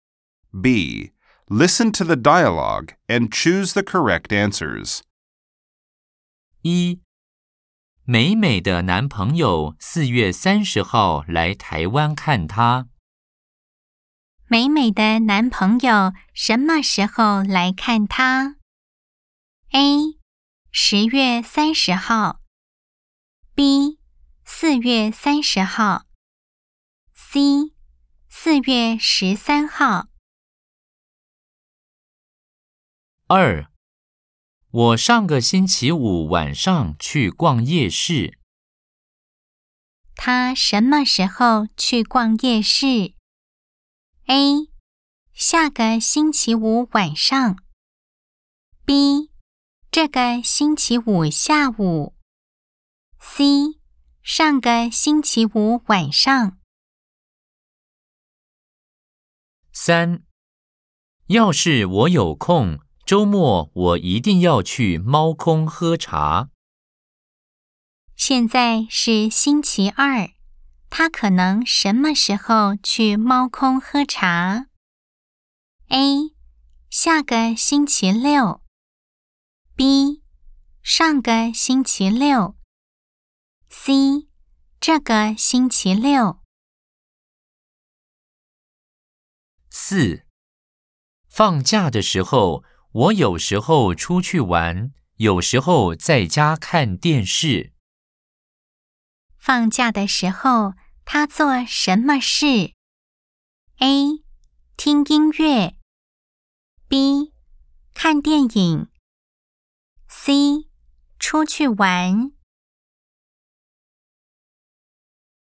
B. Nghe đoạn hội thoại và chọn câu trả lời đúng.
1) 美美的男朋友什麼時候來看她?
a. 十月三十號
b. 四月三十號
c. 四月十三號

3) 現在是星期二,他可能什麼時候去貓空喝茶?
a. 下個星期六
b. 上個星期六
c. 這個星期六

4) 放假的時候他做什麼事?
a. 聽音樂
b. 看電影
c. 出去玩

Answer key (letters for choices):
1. b
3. a
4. c